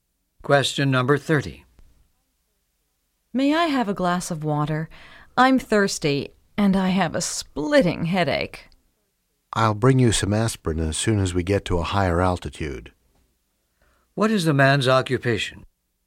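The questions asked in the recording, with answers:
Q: What is the man's occupation?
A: Flight attendant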